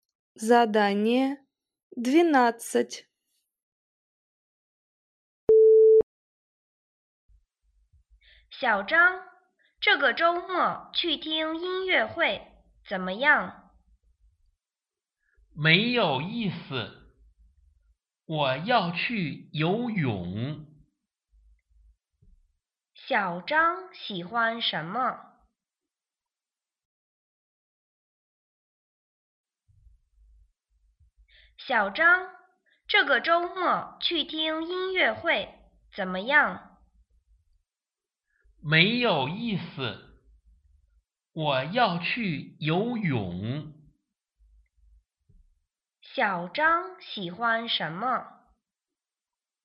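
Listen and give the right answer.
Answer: 游泳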